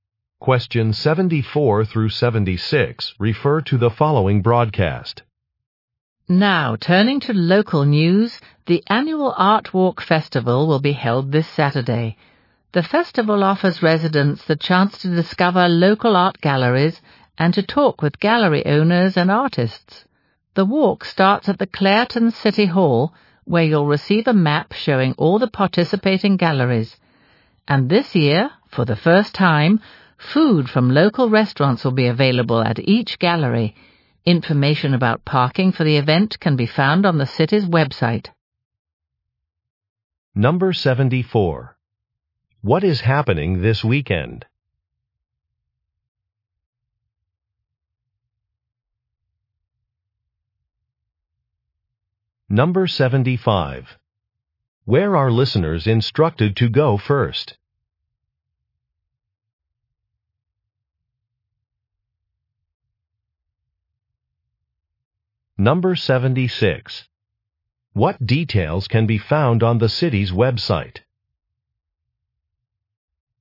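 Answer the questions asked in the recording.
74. The annual Art Walk Festival.
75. Clairton City Hall.
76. Parking information.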